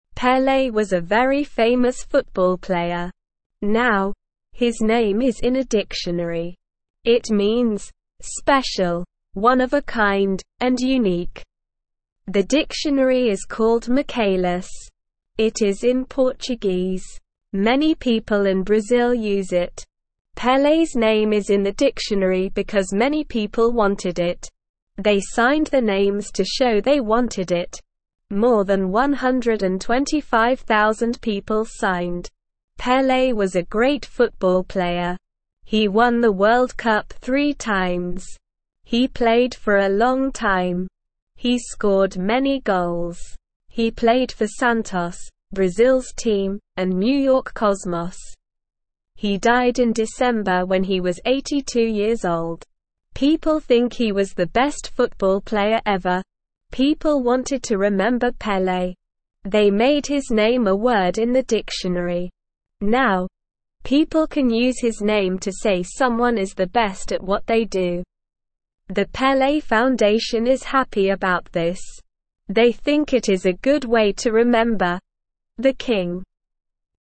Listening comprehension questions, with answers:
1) Now, his name is in a (1)_______.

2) It is in (2)_______.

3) He scored many (3)_______.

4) The (4)______ Foundation is happy about this.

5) They think it is a good way to remember "the (5)______."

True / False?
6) Pelé was a famous basketball player.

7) Pelé's name is in a Spanish dictionary.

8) The dictionary is in English.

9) More than 100,000 people signed their names.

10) Pelé won the World Cup five times.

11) He played for New York Cosmos.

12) Pelé died at 82 years old.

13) People can use his name to say someone is the best.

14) What was Pelé famous for?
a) singing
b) playing football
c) painting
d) acting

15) What language is the Michaelis dictionary in?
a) English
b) Spanish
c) French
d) Portuguese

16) Why is Pelé's name in the dictionary?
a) He wrote the dictionary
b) He was a famous writer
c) Many people wanted it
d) He was a famous actor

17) Which team did Pelé not play for?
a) Paris Saint-Germain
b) Brazil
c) New York Cosmos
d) Santos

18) What does the Pelé Foundation think about his name in the dictionary?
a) They are angry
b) They are sad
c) They are confused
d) They are happy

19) Who was Pelé?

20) Which dictionary is Pelé's name in?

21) How many people signed to show they wanted Pelé's name in the dictionary?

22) What teams did Pelé play for?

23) Why is the Pelé Foundation happy about his name being in the dictionary?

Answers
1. dictionary
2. Portuguese
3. goals
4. Pelé
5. king
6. False
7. False
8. False
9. True
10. False
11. True
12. True
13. True
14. b) playing football
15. d) Portuguese
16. c) Many people wanted it
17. a) Paris Saint-Germain
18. d) They are happy
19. Pelé was a very famous football player.
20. Pelé's name is in the Michaelis dictionary.
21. More than 125,000 people signed.
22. Pelé played for Santos, Brazil's team, and New York Cosmos.
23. The Pelé Foundation is happy because it is a good way to remember "the king."

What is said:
Pelé was a very famous football player. Now, his name is in a dictionary. It means "special, one of a kind, and unique." The dictionary is called Michaelis. It is in Portuguese. Many people in Brazil use it. Pelé's name is in the dictionary because many people wanted it. They signed their names to show they wanted it. More than 125,000 people signed.
Pelé was a great football player. He won the World Cup three times. He played for a long time. He scored many goals. He played for Santos, Brazil's team, and New York Cosmos. He died in December when he was 82 years old. People think he was the best football player ever.
People wanted to remember Pelé. They made his name a word in the dictionary. Now, people can use his name to say someone is the best at what they do. The Pelé Foundation is happy about this. They think it is a good way to remember "the king."

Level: Level 1

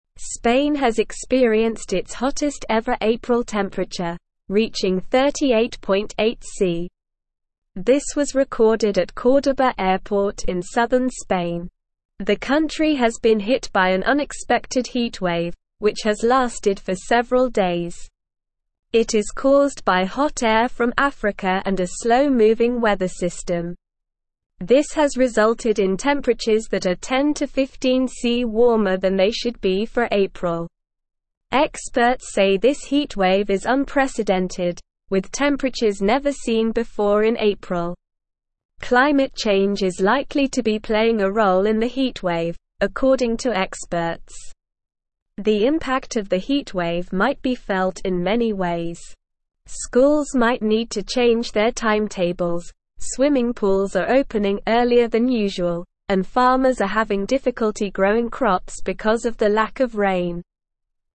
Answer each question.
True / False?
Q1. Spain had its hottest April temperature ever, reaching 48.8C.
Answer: False

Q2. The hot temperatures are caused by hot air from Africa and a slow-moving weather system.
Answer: True

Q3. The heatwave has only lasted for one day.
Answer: False

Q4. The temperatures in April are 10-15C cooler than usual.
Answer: False

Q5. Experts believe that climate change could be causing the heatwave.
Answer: True

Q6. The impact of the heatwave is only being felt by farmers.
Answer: False

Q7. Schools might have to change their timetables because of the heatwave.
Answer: True

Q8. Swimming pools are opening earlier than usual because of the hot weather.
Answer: True

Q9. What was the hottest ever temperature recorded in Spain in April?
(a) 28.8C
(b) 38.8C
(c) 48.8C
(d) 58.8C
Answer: (b) 38.8C

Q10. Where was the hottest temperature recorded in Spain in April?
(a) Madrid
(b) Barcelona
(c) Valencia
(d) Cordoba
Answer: (d) Cordoba

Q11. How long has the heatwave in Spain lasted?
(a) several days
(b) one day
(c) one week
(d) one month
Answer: (a) several days

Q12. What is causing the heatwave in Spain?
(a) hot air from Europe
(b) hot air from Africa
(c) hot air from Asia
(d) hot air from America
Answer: (b) hot air from Africa

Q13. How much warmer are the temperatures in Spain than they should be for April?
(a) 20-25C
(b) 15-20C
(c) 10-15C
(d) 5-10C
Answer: (c) 10-15C

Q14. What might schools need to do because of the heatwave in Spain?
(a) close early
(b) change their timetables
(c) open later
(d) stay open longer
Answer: (b) change their timetables

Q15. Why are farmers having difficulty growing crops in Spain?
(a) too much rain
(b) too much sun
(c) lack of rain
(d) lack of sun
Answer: (c) lack of rain

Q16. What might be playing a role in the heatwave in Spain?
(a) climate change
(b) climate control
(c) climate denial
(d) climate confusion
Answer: (a) climate change

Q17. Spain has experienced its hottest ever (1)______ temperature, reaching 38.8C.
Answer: April

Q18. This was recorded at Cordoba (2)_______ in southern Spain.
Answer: airport

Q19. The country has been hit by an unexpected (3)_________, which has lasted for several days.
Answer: heatwave

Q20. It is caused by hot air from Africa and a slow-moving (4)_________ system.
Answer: weather

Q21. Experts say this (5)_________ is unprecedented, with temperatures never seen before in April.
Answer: heatwave

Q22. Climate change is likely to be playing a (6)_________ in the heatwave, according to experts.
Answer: role

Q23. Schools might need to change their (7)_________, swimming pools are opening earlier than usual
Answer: timetables

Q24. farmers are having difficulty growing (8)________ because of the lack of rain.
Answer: crops

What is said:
Spain has experienced its hottest ever April temperature, reaching 38.8C. This was recorded at Cordoba airport in southern Spain. The country has been hit by an unexpected heatwave, which has lasted for several days. It is caused by hot air from Africa and a slow-moving weather system. This has resulted in temperatures that are 10-15C warmer than they should be for April. Experts say this heatwave is unprecedented, with temperatures never seen before in April. Climate change is likely to be playing a role in the heatwave, according to experts. The impact of the heatwave might be felt in many ways. Schools might need to change their timetables, swimming pools are opening earlier than usual, and farmers are having difficulty growing crops because of the lack of rain.

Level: Level 1

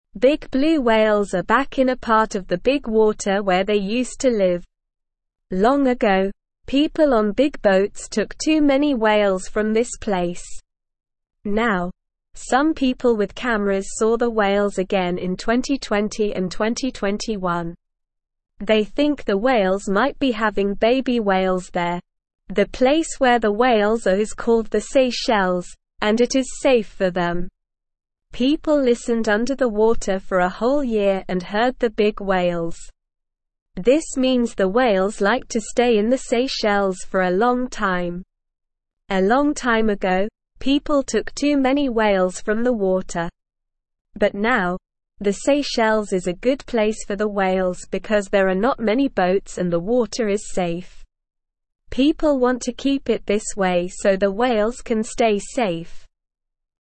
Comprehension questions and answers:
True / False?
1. Some people with cameras saw the whales again in 2020 and 2021.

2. The people think the whales might be having baby whales in the Seychelles.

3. People listened above the water for a whole year and didn't hear the big whales.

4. The whales are unhappy and unsafe in the Seychelles.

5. The whales like to stay in the Seychelles for a long time.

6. The Seychelles is a bad place for the whales because there are many boats and the water is dangerous.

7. Big blue whales used to live in a place called the Seychelles, but people didn't take any of them long ago.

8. People want to keep the Seychelles safe so the whales can stay there.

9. Big (1)______ whales are back in a (2)______ of the big water where they used to live.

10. Big (1)______ whales are back in a (2)______ of the big water where they used to live.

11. The (3)______ where the whales are is (4)______ the Seychelles, and it is safe for them.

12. The (3)______ where the whales are is (4)______ the Seychelles, and it is safe for them.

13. This means the whales (5)______ to (6)______ in the Seychelles for a long time.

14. This means the whales (5)______ to (6)______ in the Seychelles for a long time.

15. A long time ago, people took too many whales from the (7)______.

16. But now, the Seychelles is a good place for the whales because there are not (8)______ boats and the water is safe.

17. Where did people see the big blue whales again in 2020 and 2021?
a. Australia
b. Canada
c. Brazil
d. Seychelles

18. Why is the Seychelles a good place for the whales?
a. There are many boats and the water is dangerous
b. There are not many boats and the water is dangerous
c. There are not many boats and the water is safe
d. There are many boats and the water is safe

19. What do people think the whales might be doing in the Seychelles?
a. Having baby whales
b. Playing with other animals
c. Eating a lot of fish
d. Sleeping all day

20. When did people first see the whales in the Seychelles?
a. 2020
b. 2010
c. 2000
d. 1990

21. What color are the whales mentioned in the article?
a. Red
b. Green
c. Yellow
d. Blue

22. What did people use to see the whales in the Seychelles?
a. Binoculars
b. Cameras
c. Telescopes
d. Microscopes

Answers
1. True
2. True
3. False
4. False
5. True
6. False
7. False
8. True
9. blue
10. part
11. place
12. called
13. like
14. stay
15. water
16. many
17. d. Seychelles
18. c. There are not many boats and the water is safe
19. a. Having baby whales
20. a. 2020
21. d. Blue
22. b. Cameras

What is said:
Big blue whales are back in a part of the big water where they used to live. Long ago, people on big boats took too many whales from this place. Now, some people with cameras saw the whales again in 2020 and 2021. They think the whales might be having baby whales there. The place where the whales are is called the Seychelles, and it is safe for them.
People listened under the water for a whole year and heard the big whales. This means the whales like to stay in the Seychelles for a long time. A long time ago, people took too many whales from the water. But now, the Seychelles is a good place for the whales because there are not many boats and the water is safe. People want to keep it this way so the whales can stay safe.

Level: Level 1

